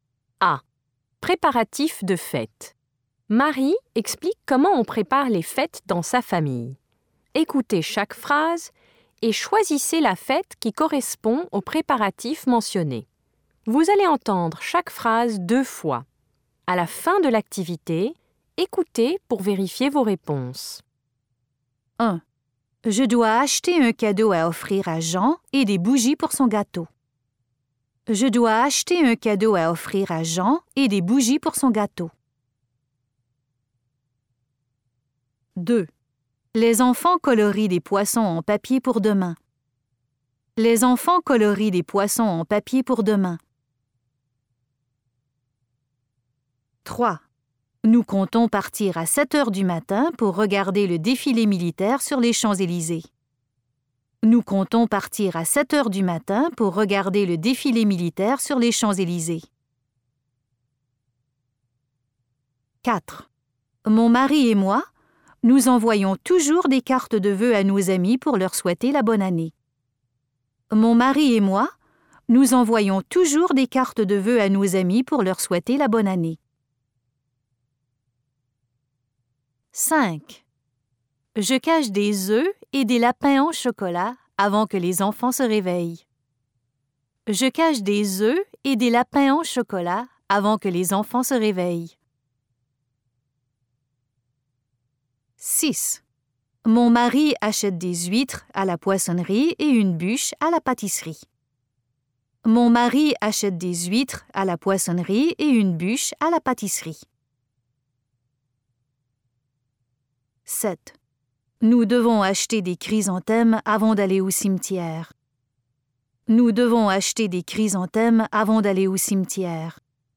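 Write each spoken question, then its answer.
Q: Je dois acheter un cadeau à offrir à Jean et des bougies pour son gâteau.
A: un anniversaire

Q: Les enfants colorient des poissons en papier pour demain.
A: le premier avril (poisson d'avril)

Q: Nous comptons partir à 7 heures du matin pour regarder le défilé militaire sur les Champs-Élysées.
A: le 14 juillet (fête nationale)

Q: Mon mari et moi, nous envoyons toujours des cartes de vœux à nos amis pour leur souhaiter la bonne année.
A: le Nouvel An

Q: Je cache des œufs et des lapins en chocolat avant que les enfants se réveillent.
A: Pâques

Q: Mon mari achète des huîtres à la poissonnerie et une bûche à la pâtisserie.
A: Noël

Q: Nous devons acheter des chrysanthèmes avant d'aller au cimetière.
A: la Toussaint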